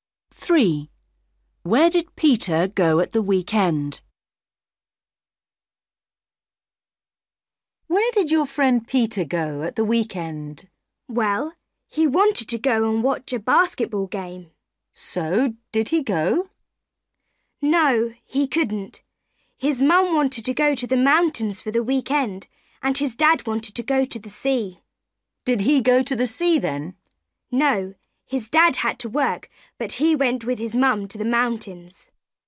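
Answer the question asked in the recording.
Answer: to the mountains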